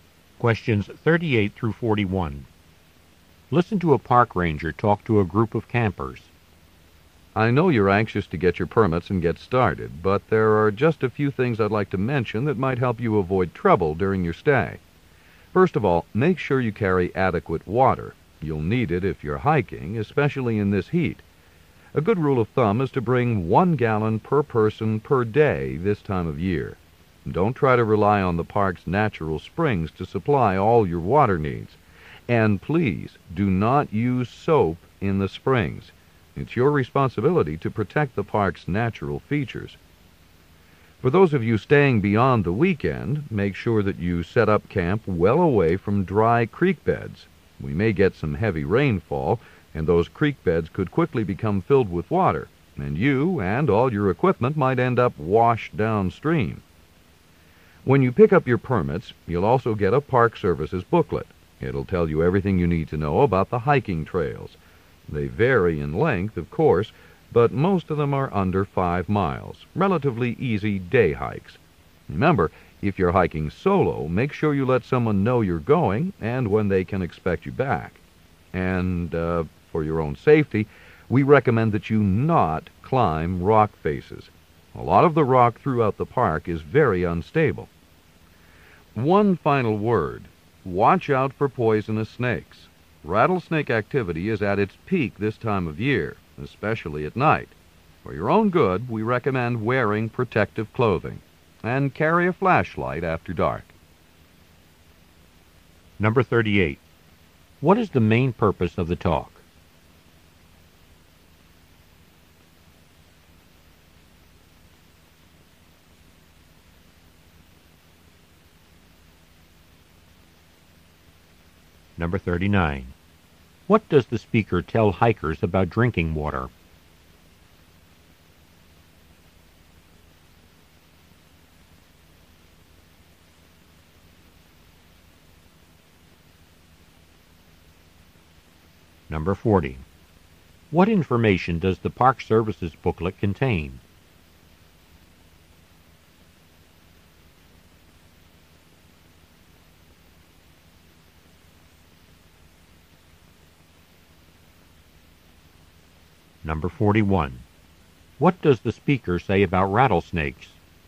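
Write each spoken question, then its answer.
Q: What is the main purpose of the talk?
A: To give campers safety advice and tips before their stay in the park

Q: What does the speaker tell hikers about drinking water?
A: Carry enough water, about 1 gallon per person per day, and don't rely on the springs

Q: What information does the Park Service's booklet contain?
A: Information about the hiking trails

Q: What does the speaker say about rattlesnakes?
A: They are most active this time of year, especially at night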